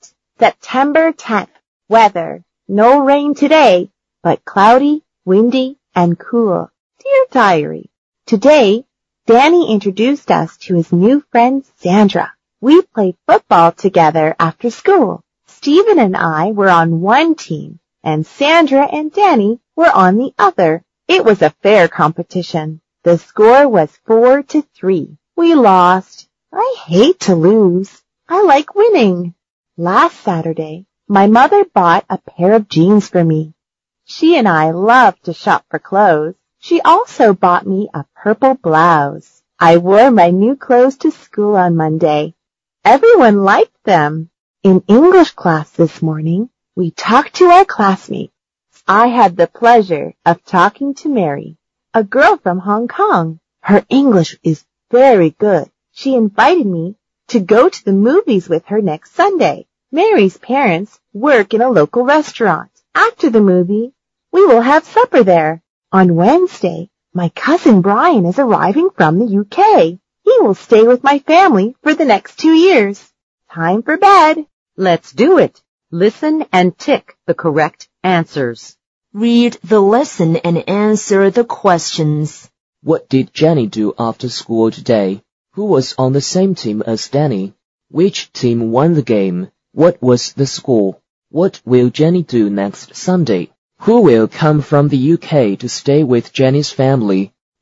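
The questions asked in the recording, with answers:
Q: What did Jenny do after school today?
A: She played football with Steven, Sandra and Danny.

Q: Who was on the same team as Danny?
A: Sandra

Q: Which team won the game? What was the score?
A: Sandra and Danny's team won; the score was 4-3.

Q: What will Jenny do next Sunday?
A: She will go to the movies with Mary and then have supper at a local restaurant.

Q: Who will come from the UK to stay with Jenny's family?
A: Her cousin Brian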